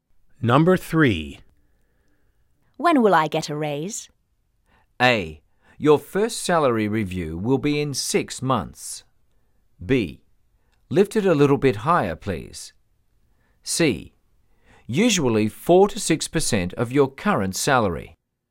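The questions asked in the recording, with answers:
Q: When will I get a raise?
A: A: Your first salary review will be in 6 months.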